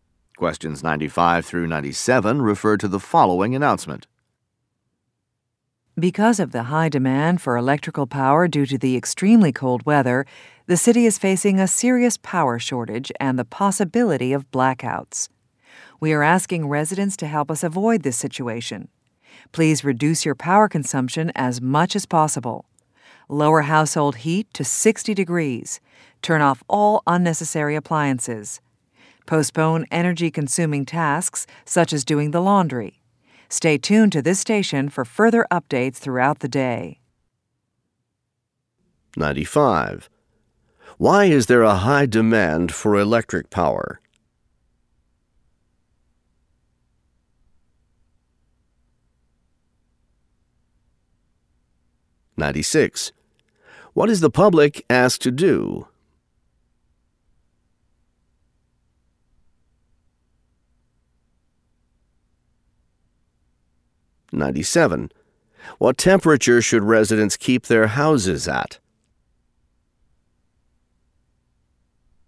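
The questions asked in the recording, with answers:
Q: Why is there a high demand for electric power?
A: Extremely cold weather

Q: What is the public asked to do?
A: Reduce power consumption

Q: What temperature should residents keep their houses at?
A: 60 degrees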